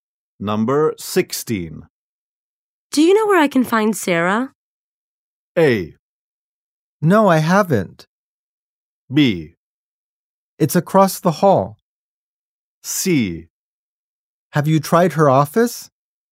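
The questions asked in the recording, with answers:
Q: Do you know where I can find Sarah?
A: C: Have you tried her office?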